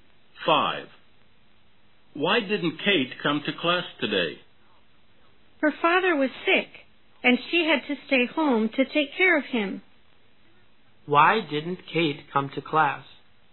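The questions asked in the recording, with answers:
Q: Why didn't Kate come to class?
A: She had to stay home to take care of her sick father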